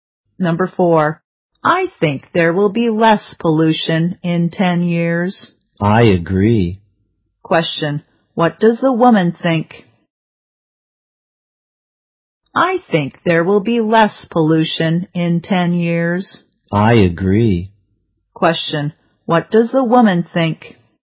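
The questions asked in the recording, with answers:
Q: Question, what does the woman think?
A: There will be less pollution in 10 years.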